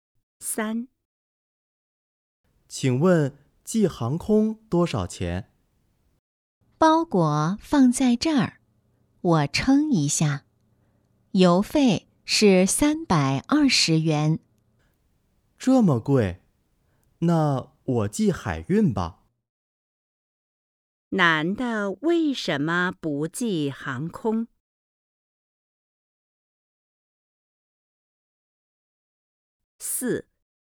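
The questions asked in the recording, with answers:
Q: 男的为什么不寄航空?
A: 太贵了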